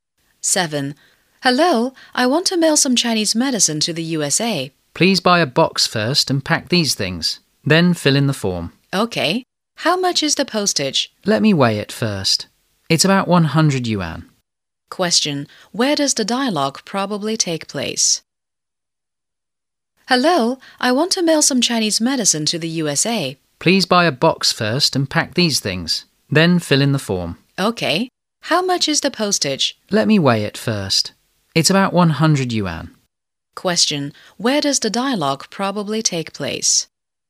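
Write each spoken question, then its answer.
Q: Question. Where does the dialogue probably take place?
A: At a post office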